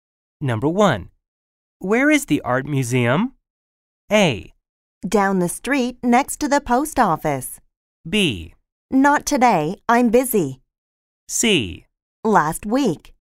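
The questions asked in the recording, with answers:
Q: Where is the art museum?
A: A: Down the street next to the post office.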